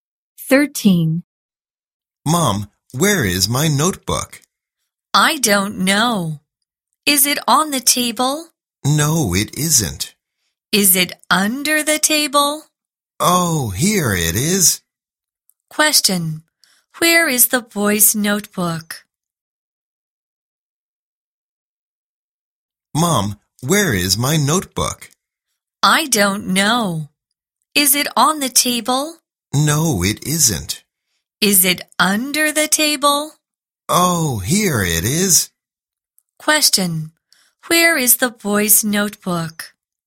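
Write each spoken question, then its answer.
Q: where is the boy's notebook?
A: Under the table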